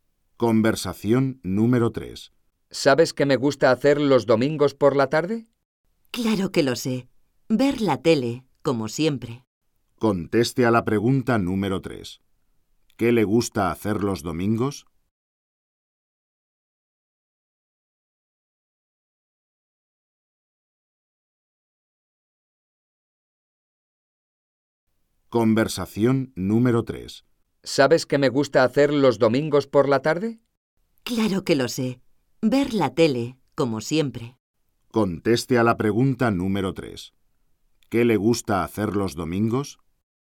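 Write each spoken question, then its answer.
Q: ¿Qué le gusta hacer los domingos?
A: Ver la tele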